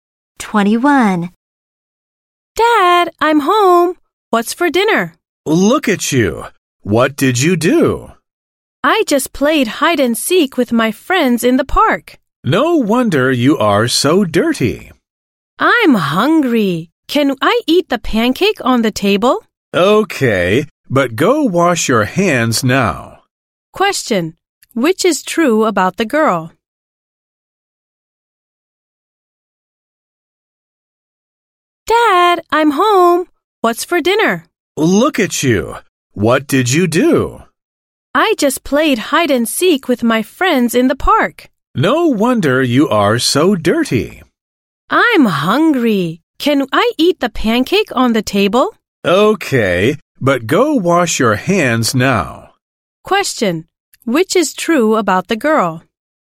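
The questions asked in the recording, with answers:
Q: Which is true about the girl?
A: She played hide and seek in the park and got dirty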